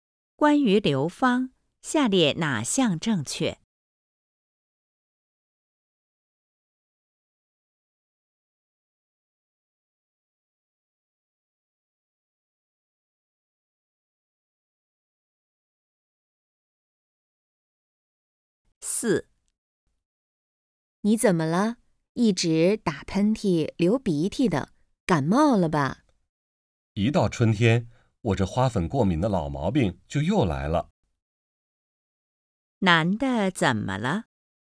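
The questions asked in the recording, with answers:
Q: 男的怎么了?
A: 花粉过敏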